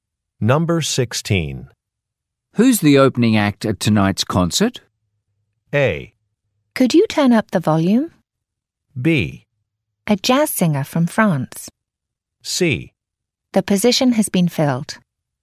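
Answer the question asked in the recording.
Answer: B: A jazz singer from France.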